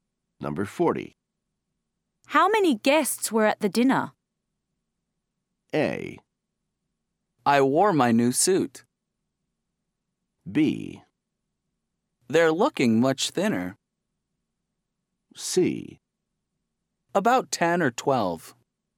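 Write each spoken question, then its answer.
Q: How many guests were at the dinner?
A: C: About 10 or 12.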